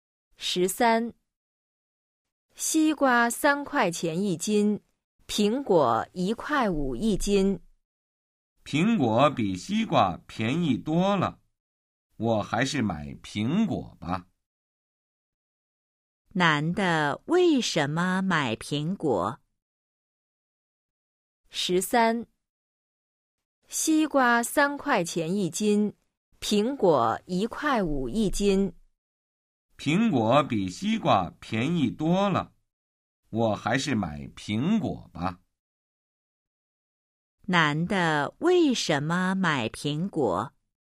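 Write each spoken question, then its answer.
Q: 男的为什么买苹果?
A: 苹果比西瓜便宜多了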